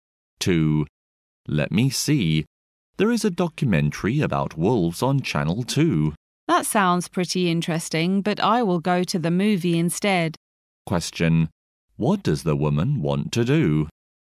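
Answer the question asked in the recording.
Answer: Go to the movie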